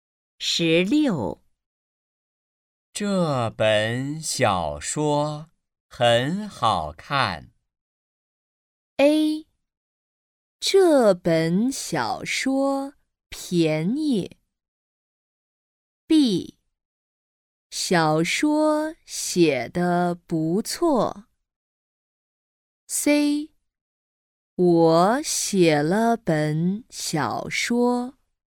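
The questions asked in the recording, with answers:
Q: 这本小说很好看。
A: B: 小说写得不错。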